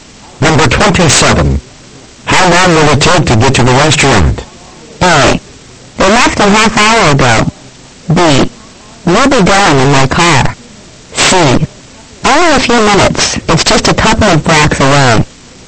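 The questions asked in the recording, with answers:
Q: How long will it take to get to the restaurant?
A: C: Only a few minutes. It's just a couple of blocks away.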